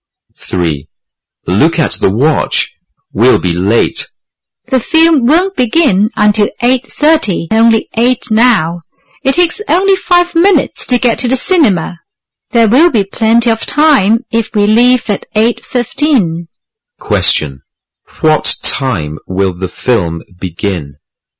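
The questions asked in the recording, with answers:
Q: What time will the film begin?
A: At 8:30.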